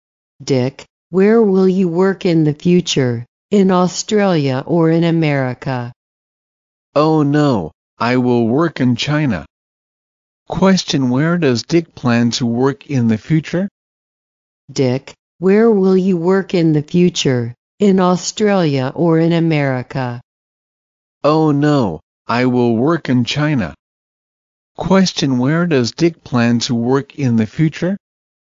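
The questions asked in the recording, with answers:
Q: Question, where does Dick plan to work in the future?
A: In China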